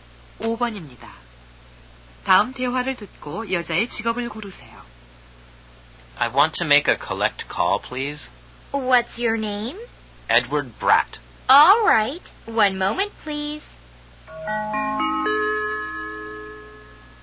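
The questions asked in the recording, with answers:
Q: 다음 대화를 듣고 여자의 직업을 고르세요.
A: 전화 교환원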